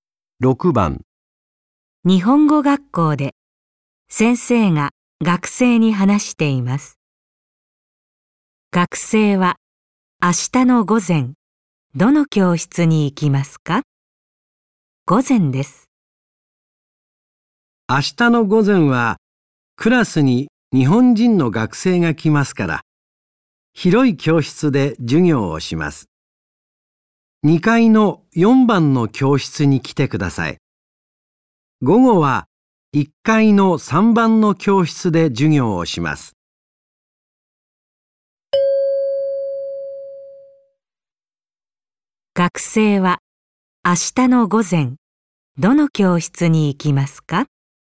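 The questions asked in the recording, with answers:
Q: 学生は明日の午前、どの教室に行きますか?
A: 2階の4番の教室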